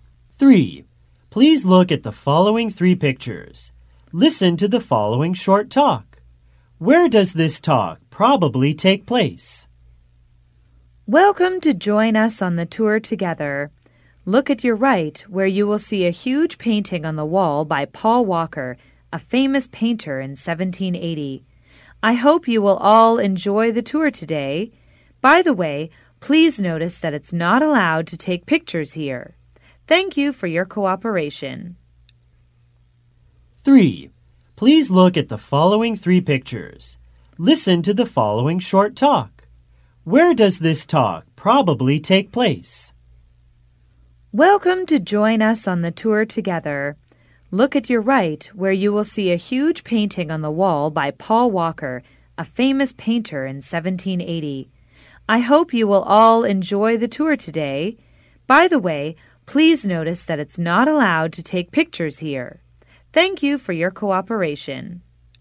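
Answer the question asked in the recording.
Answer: In a museum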